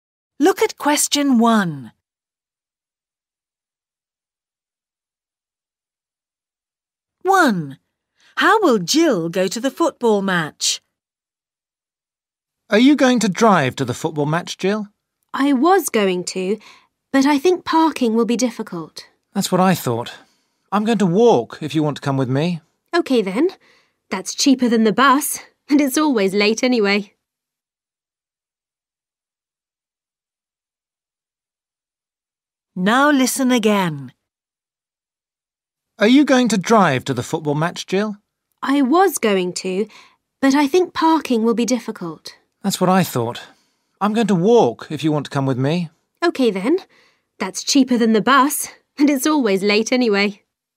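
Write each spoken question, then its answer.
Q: How will Jill go to the football match?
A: walk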